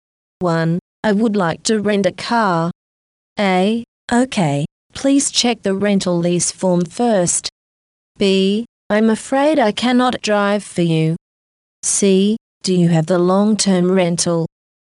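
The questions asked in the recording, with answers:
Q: I would like to rent a car.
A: A: Okay, please check the rental lease form first.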